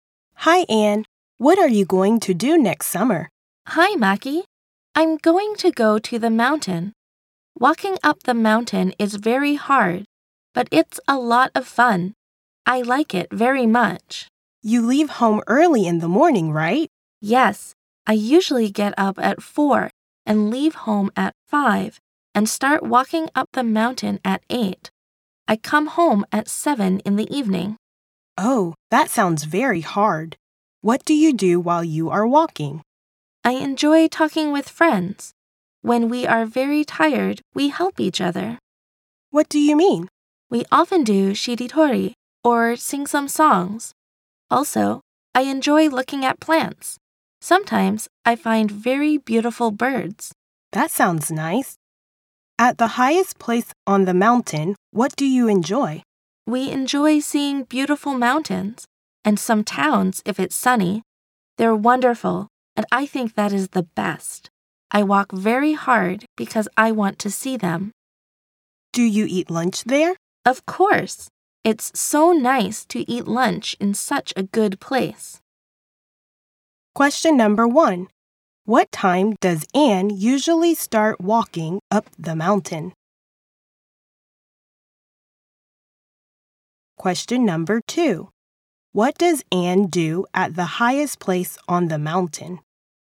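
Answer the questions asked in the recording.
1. At 8
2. She enjoys seeing beautiful mountains and towns, and eats lunch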